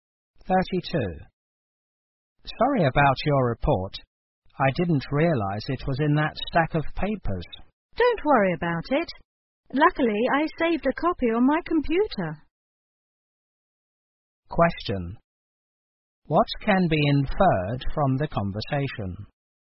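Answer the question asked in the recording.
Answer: The report wasn't lost because a copy was saved on the computer.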